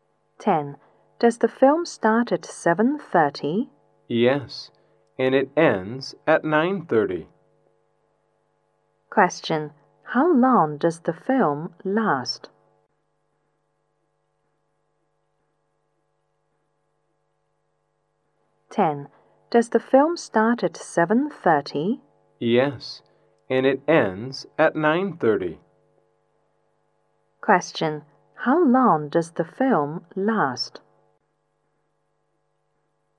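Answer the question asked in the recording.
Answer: Two hours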